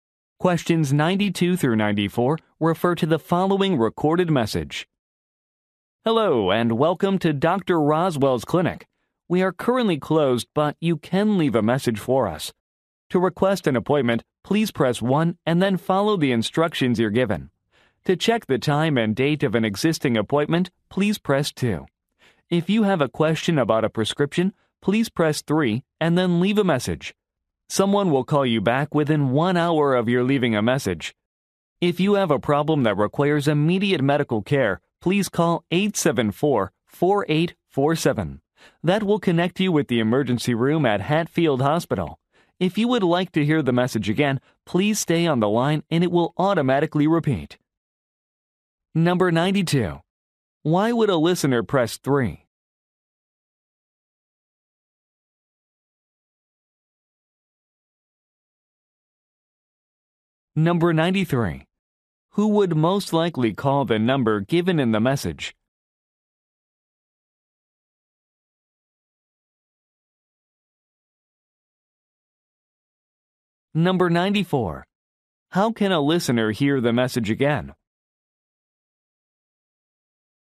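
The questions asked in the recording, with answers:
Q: Why would a listener press 3?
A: To ask a question about a prescription

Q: Who would most likely call the number given in the message?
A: Someone needing immediate medical care

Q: How can a listener hear the message again?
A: By staying on the line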